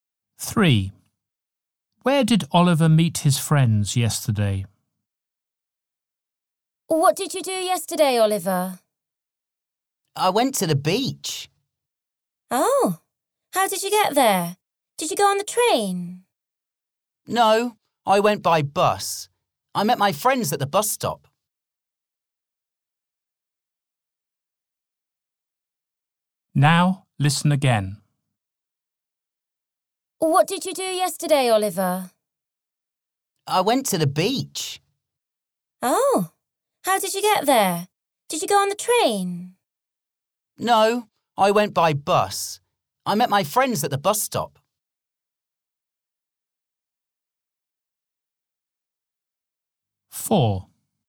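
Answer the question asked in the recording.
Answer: At the bus stop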